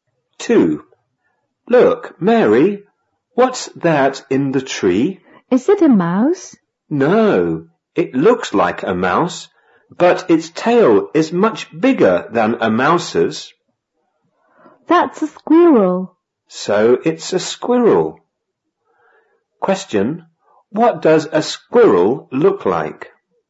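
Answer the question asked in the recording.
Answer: It looks like a mouse, but its tail is much bigger.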